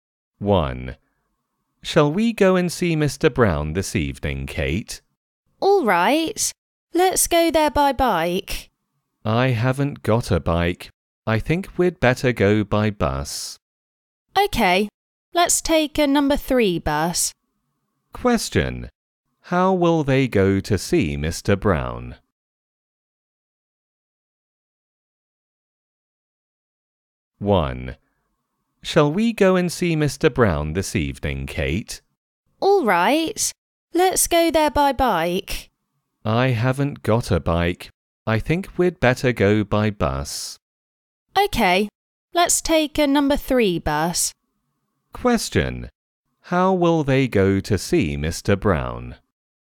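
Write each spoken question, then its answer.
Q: How will they go to see Mr. Brown?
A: By bus (a number 3 bus)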